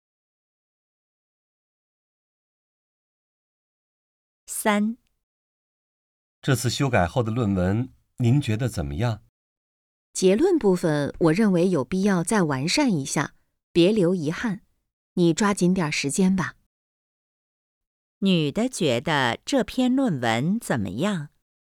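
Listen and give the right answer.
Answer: 结论部分还需要完善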